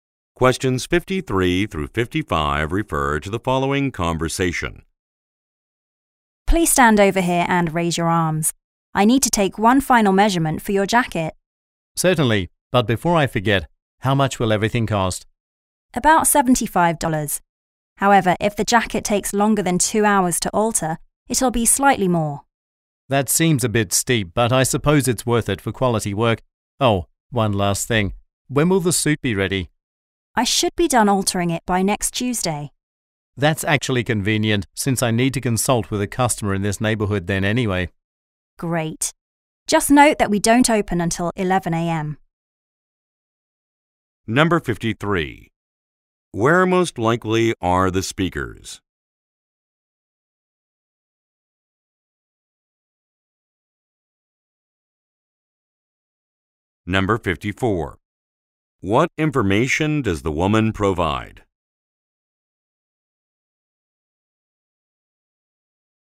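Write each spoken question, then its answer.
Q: Where most likely are the speakers?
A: At a tailor's shop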